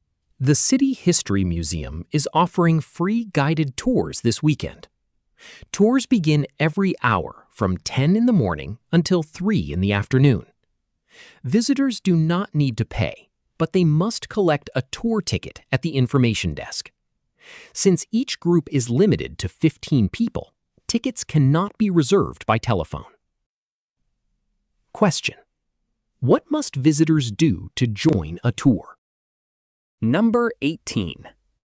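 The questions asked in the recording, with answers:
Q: what must visitors do to join a tour?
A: Collect a tour ticket at the information desk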